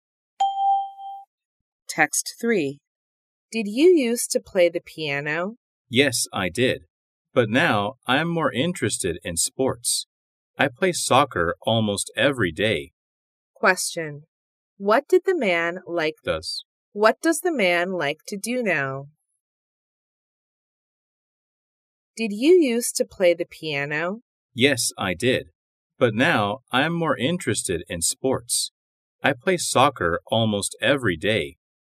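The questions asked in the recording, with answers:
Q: What does the man like to do now?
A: Play soccer (sports).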